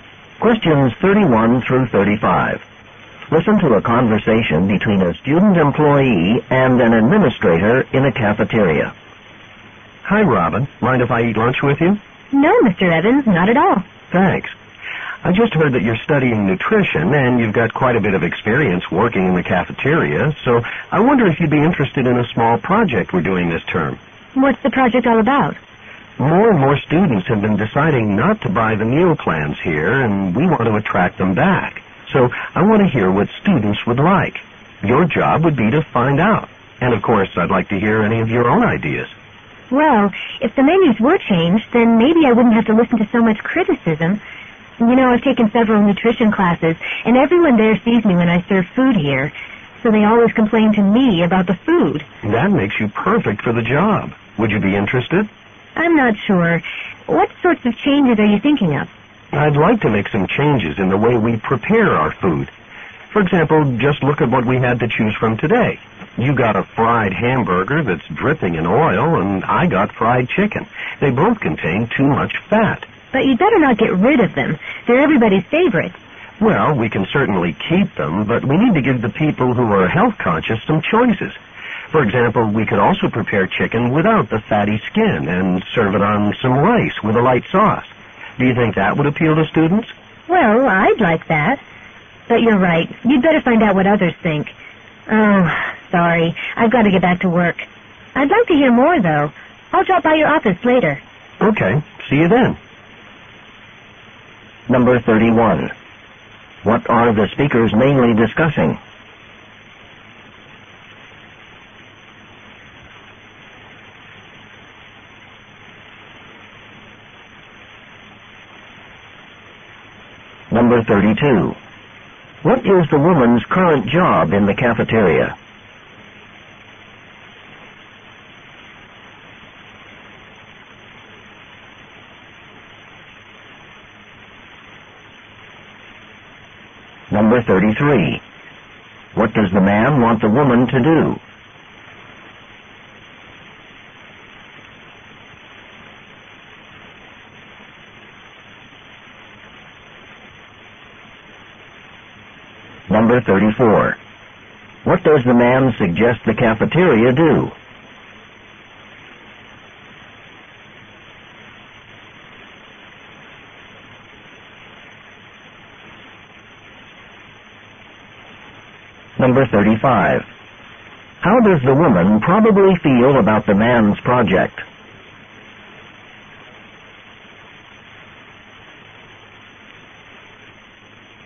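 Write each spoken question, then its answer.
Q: What are the speakers mainly discussing?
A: A project to improve the cafeteria food and win students back

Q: What is the woman's current job in the cafeteria?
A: She serves food

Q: What does the man want the woman to do?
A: Find out what students would like

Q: What does the man suggest the cafeteria do?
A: Offer healthier, lower-fat food choices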